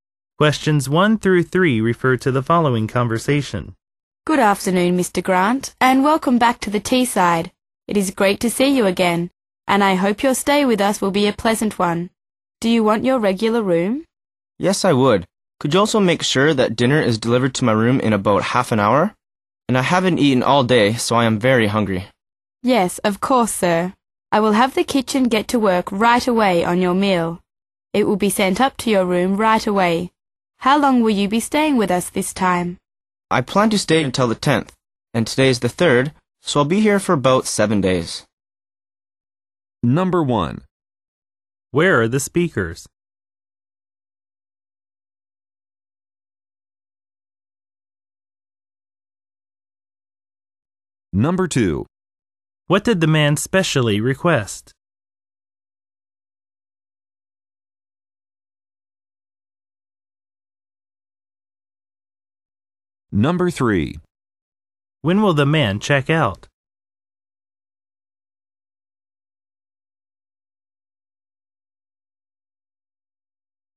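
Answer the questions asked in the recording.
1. At a hotel (the Teesside)
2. Dinner delivered to his room in about half an hour
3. On the 10th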